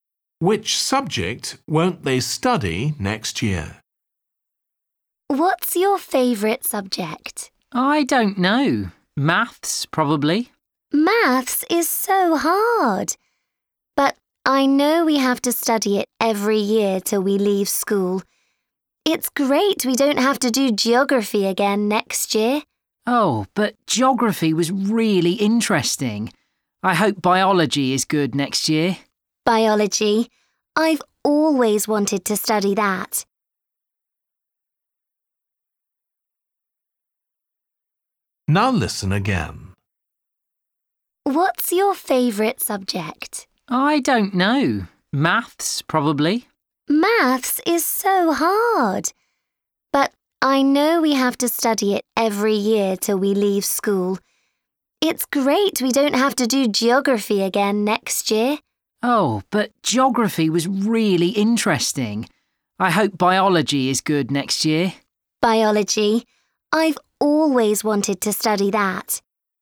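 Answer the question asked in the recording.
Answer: geography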